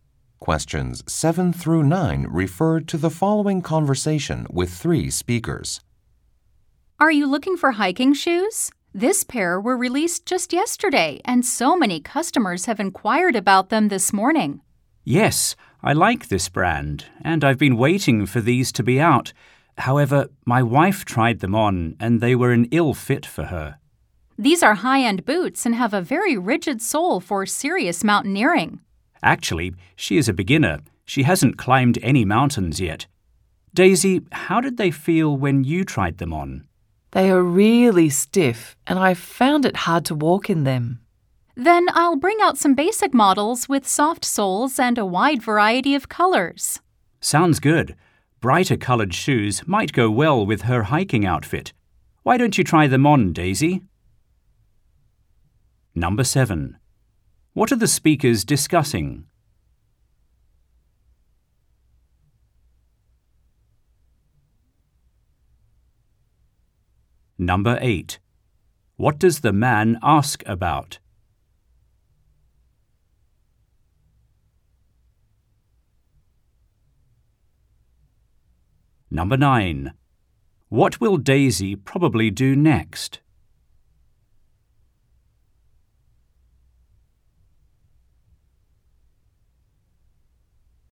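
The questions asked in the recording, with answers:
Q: What are the speakers discussing?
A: Hiking shoes

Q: What will Daisy probably do next?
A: Try on basic shoes with soft soles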